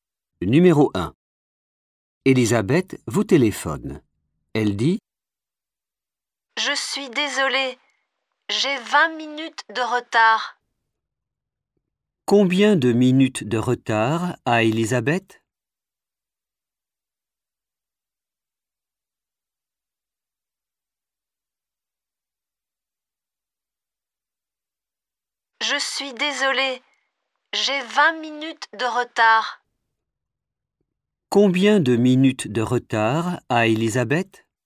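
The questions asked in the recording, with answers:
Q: Combien de minutes de retard a Elisabeth ?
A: 20 minutes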